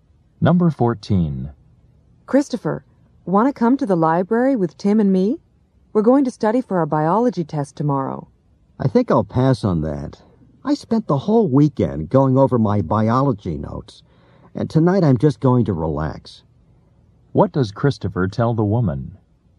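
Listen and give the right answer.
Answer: He won't go to the library; he'll relax tonight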